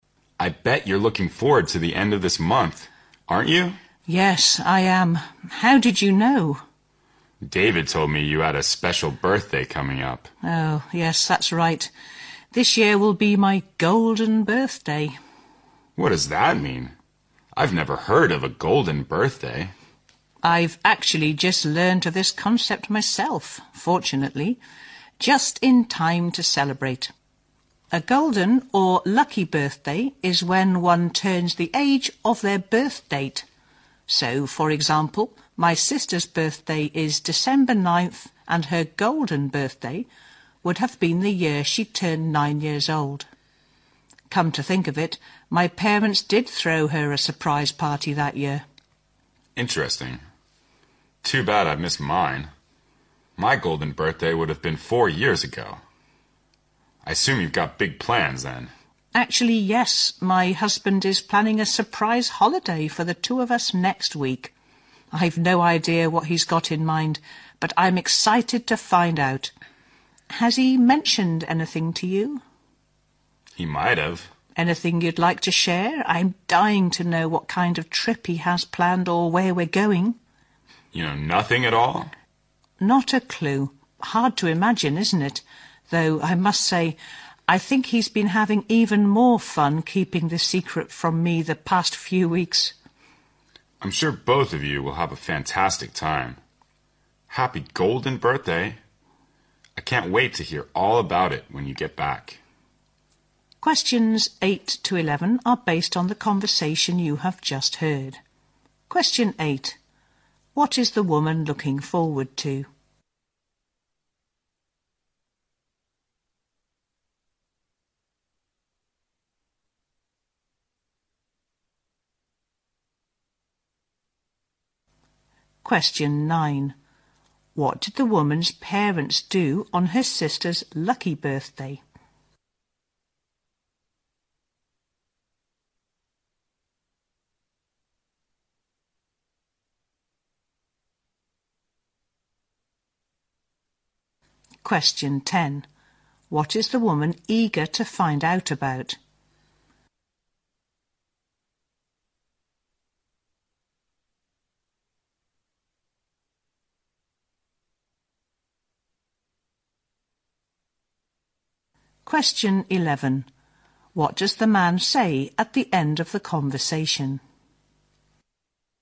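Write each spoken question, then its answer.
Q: What is the woman looking forward to?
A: Her golden birthday

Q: What did the woman's parents do on her sister's lucky birthday?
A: They threw her a surprise party

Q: What is the woman eager to find out about?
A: The trip her husband has planned for them

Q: What does the man say at the end of the conversation?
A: He wants to hear all about the trip when she gets back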